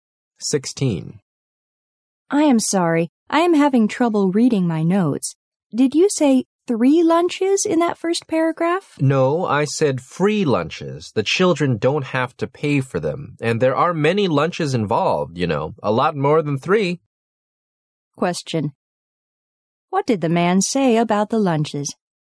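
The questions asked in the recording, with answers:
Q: What did the man say about the lunches?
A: They are free lunches, and there are many more than 3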